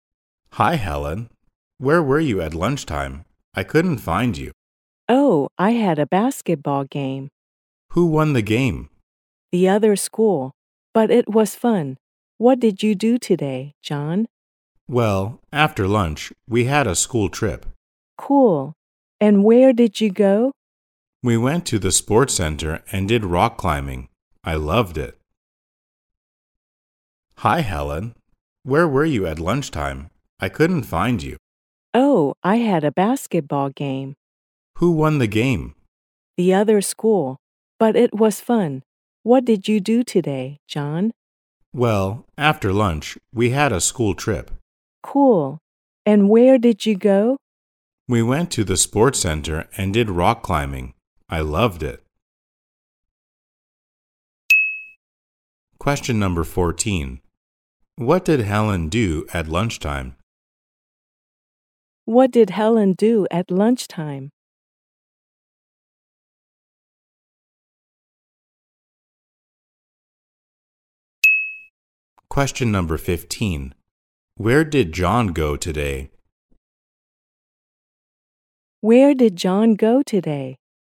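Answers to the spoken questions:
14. She had a basketball game
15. The sports center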